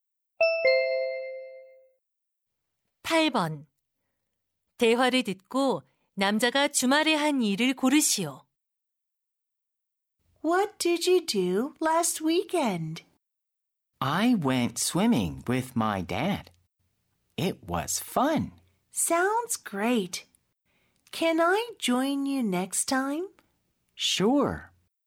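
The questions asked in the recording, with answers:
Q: 대화를 듣고 남자가 주말에 한 일을 고르시오.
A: 아빠와 수영하러 감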